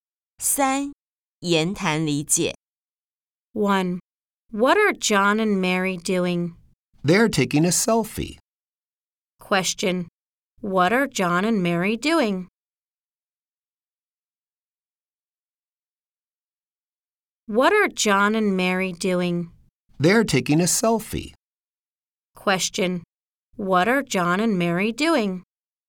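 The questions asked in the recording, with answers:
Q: What are John and Mary doing?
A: They're taking a selfie.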